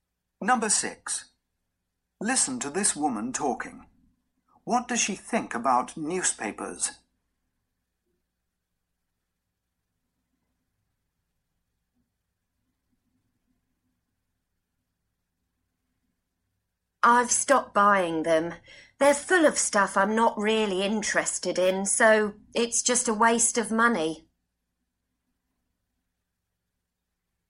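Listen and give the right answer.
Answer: They're a waste of money, full of things she's not interested in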